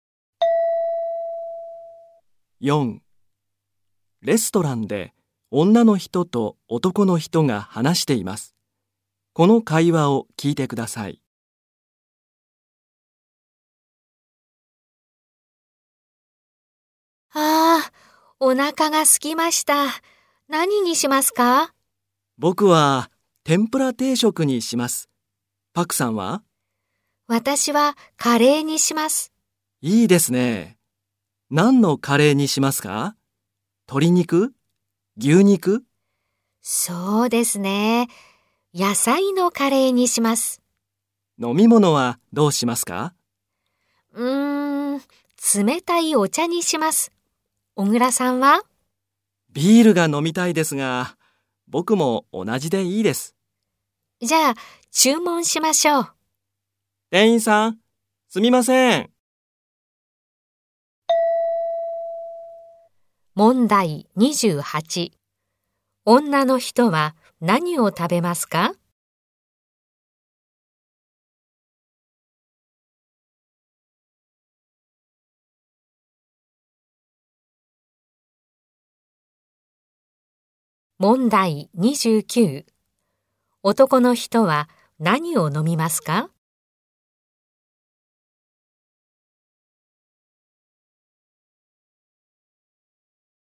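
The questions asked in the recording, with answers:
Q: 女の人は何を食べますか?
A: 野菜のカレー

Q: 男の人は何を飲みますか?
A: 冷たいお茶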